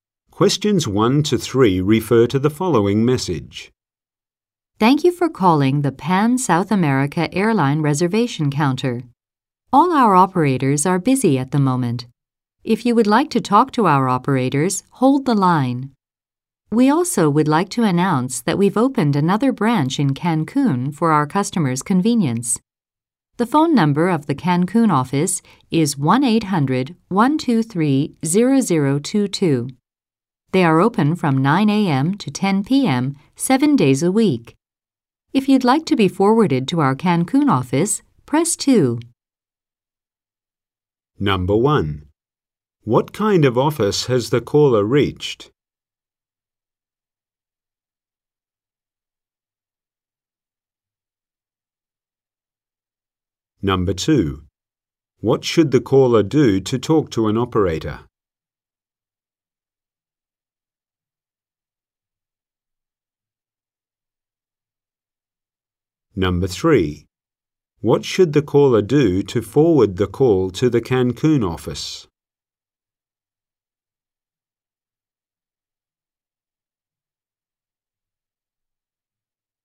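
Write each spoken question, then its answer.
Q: What kind of office has the caller reached?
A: An airline reservation counter

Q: What should the caller do to talk to an operator?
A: Hold the line

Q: What should the caller do to forward the call to the Cancun office?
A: Press 2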